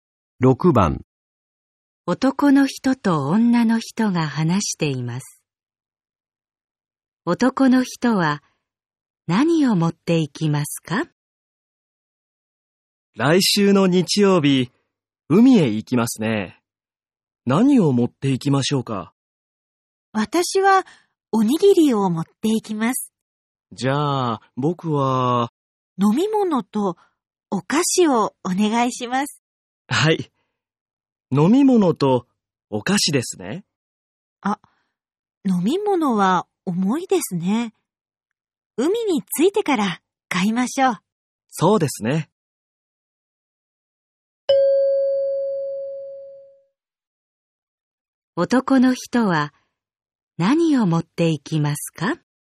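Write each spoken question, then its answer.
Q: 男の人は何を持っていきますか?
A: お菓子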